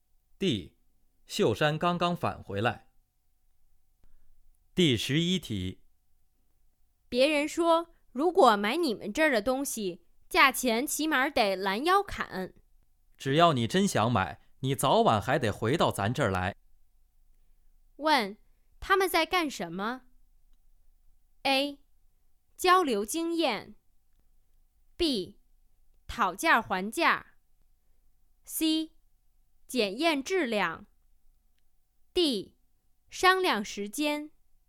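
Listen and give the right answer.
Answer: B: 讨价还价。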